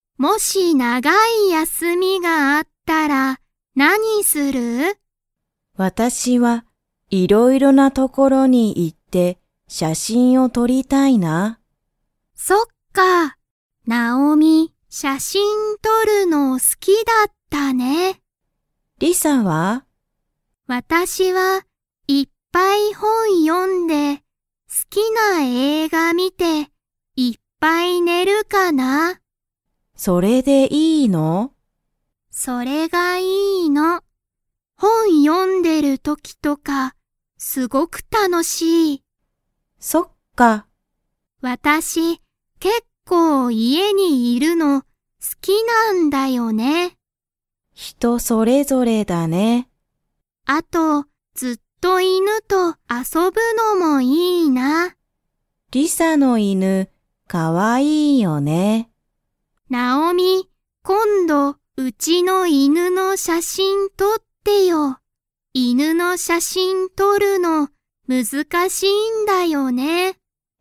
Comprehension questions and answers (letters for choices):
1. ナオミは、____のが好(す)きだ。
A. 写真(しゃしん)を撮(と)る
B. ご飯(はん)を食(た)べる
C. 友達(ともだち)と遊(あそ)ぶ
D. 山(やま)に行(い)く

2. ナオミは今度(こんど)、何(なん)の写真(しゃしん)を撮(と)りますか?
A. リサ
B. リサの子供(こども)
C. リサの友達(ともだち)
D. リサの犬(いぬ)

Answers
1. A
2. D

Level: Level 2